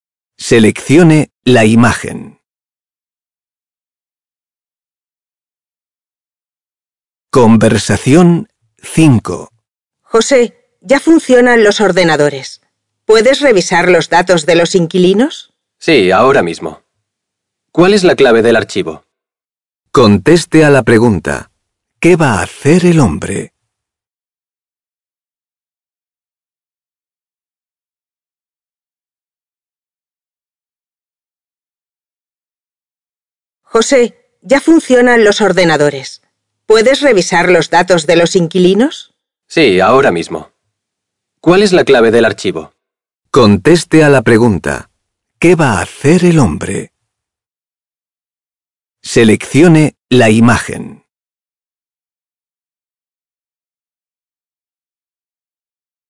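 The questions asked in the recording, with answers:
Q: ¿Qué va a hacer el hombre?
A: Revisar los datos de los inquilinos en el ordenador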